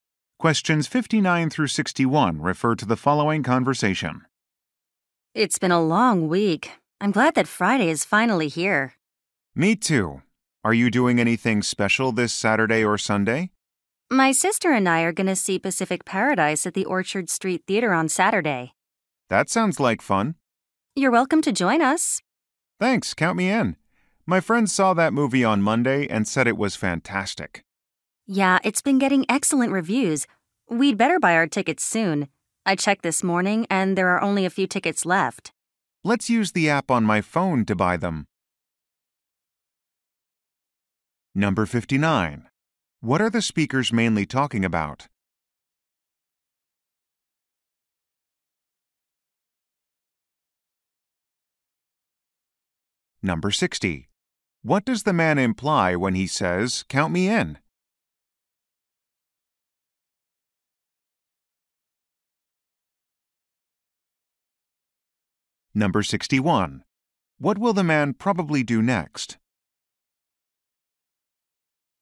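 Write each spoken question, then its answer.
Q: What are the speakers mainly talking about?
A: Weekend plans to see a movie.

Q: What does the man imply when he says, "Count me in"?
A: He will join them at the movie.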